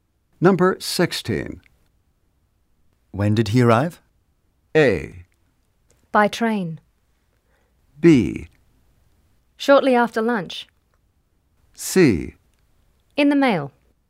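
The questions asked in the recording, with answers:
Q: When did he arrive?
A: B: Shortly after lunch.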